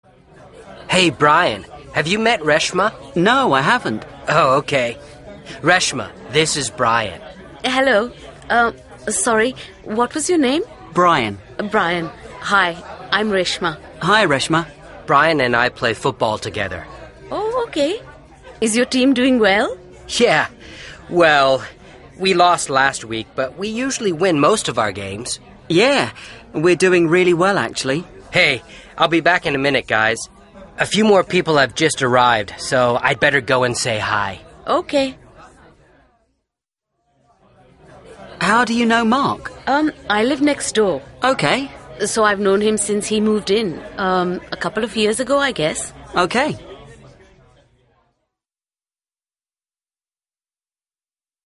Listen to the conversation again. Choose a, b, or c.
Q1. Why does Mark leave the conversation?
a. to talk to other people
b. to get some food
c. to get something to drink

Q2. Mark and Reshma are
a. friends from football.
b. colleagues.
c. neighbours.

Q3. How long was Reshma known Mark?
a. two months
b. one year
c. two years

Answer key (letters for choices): 1a, 2c, 3c

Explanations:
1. He says 'a few more people have just arrived so I'd better go and say hi'.
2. Reshma says 'I live next door'.
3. Reshma says 'I've known him since he moved in, a couple of years ago'. 'A couple' means 'about two'.